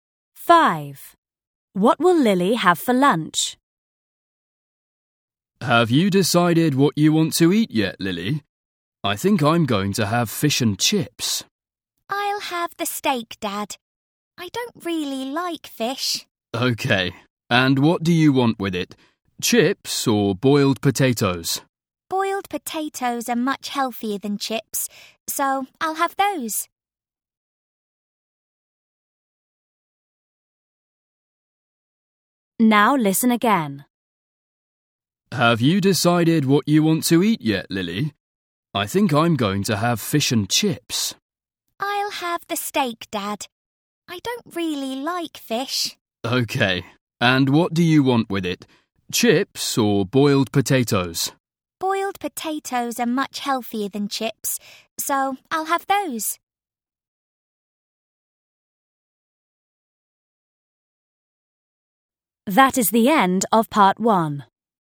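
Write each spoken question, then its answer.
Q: What will Lily have for lunch?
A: steak and boiled potatoes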